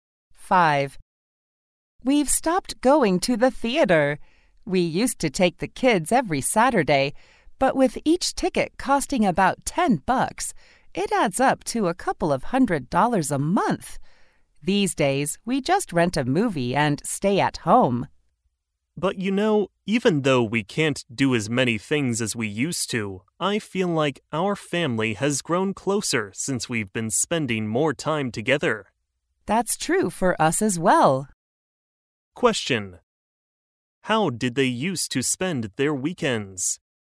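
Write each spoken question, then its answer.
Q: How did they used to spend their weekends?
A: They took the kids to the theater every Saturday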